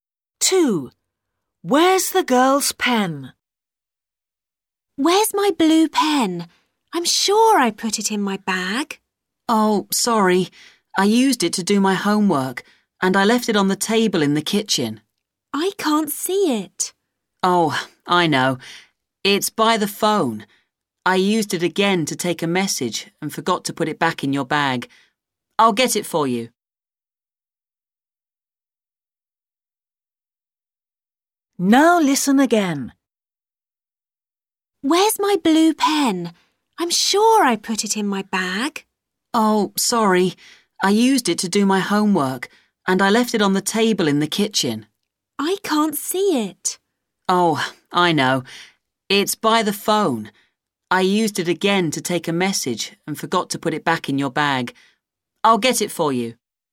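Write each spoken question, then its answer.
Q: Where's the girl's pen?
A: by the phone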